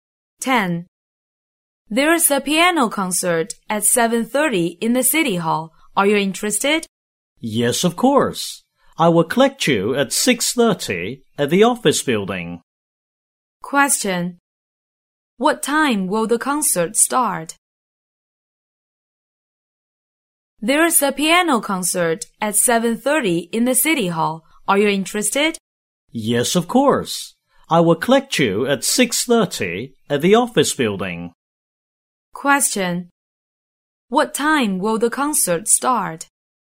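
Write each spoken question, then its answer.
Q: What time will the concert start?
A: At 7:30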